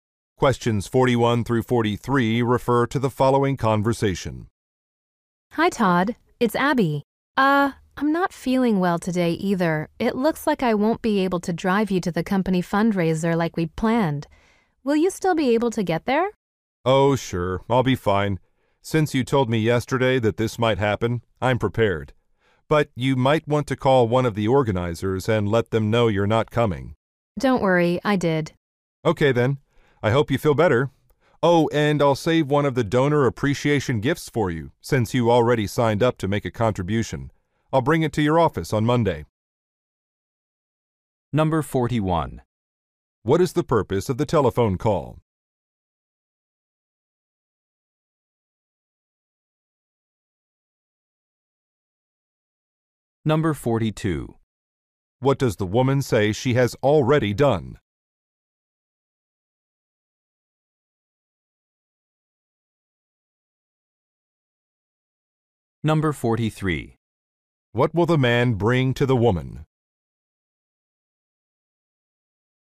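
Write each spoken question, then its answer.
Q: What is the purpose of the telephone call?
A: To cancel a plan to drive the man to the fundraiser

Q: What does the woman say she has already done?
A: Called an organizer to say she isn't coming

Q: What will the man bring to the woman?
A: A donor appreciation gift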